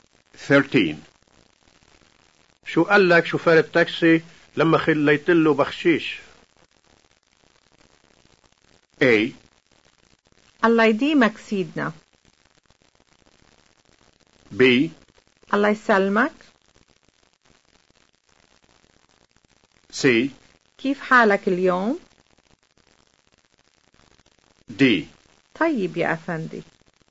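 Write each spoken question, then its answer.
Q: شو قال لك شوفير التاكسي لما خليت له بخشيش؟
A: A: الله يديمك سيدنا.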